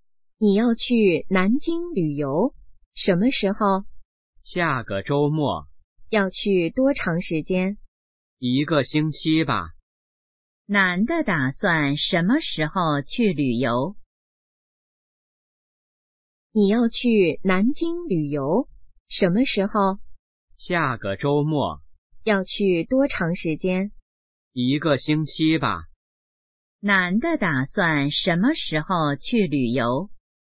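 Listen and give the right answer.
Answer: 下个周末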